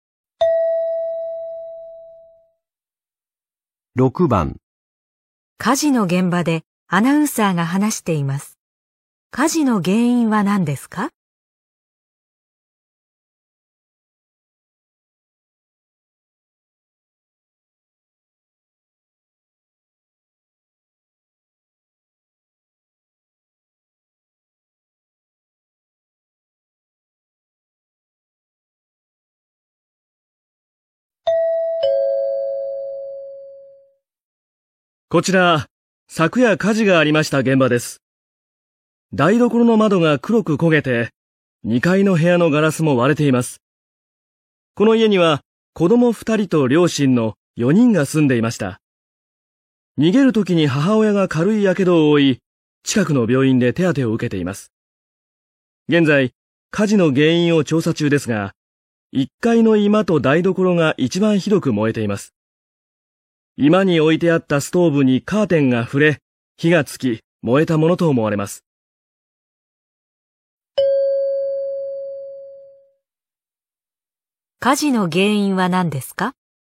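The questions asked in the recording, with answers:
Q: 火事の原因は何ですか?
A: 居間のストーブにカーテンが触れて火がついた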